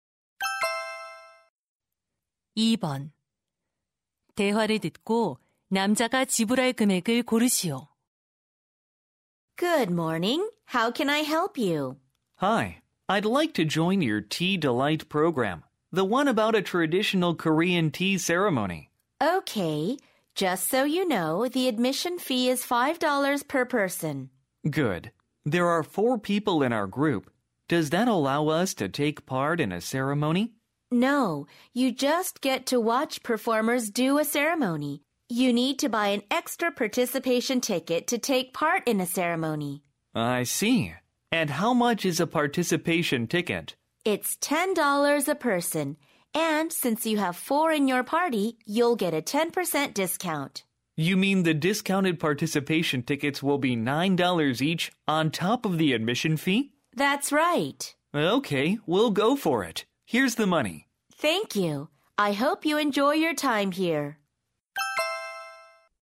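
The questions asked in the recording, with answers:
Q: 대화를 듣고 남자가 지불할 금액을 고르시오.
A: $56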